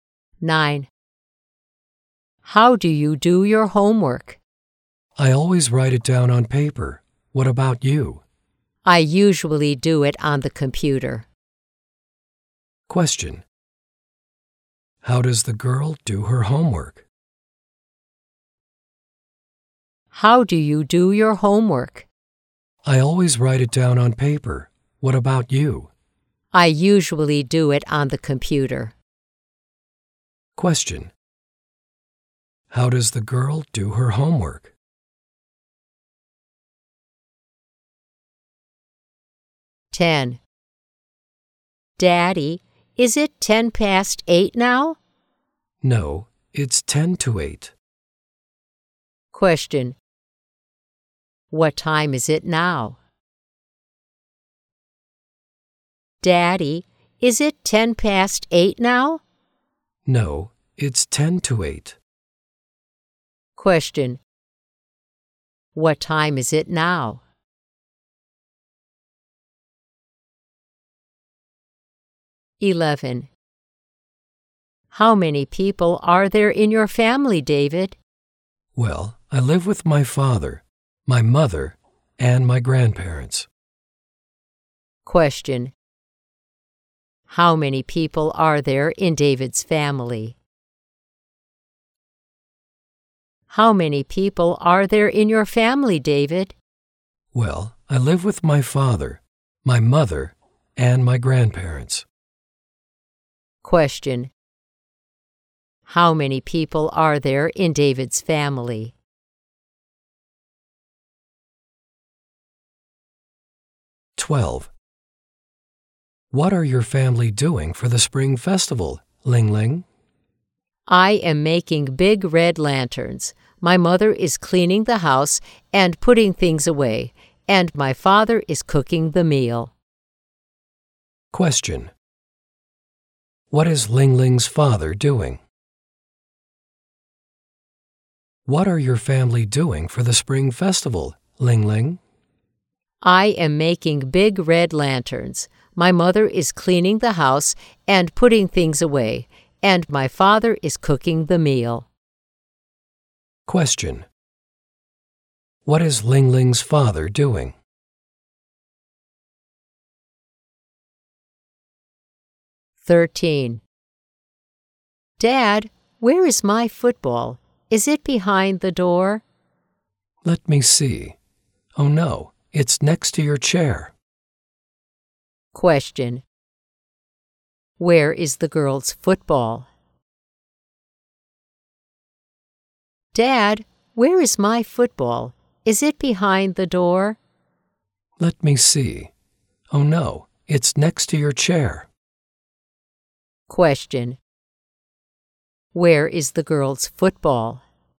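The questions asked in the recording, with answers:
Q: How many people are there in David's family?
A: Five

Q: What is Ling Ling's father doing?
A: He is cooking the meal.

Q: Where is the girl's football?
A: Next to her chair.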